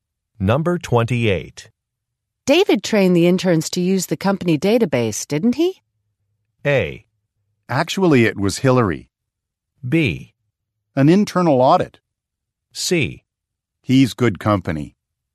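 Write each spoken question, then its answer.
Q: David trained the interns to use the company database, didn't he?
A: A: Actually, it was Hillary.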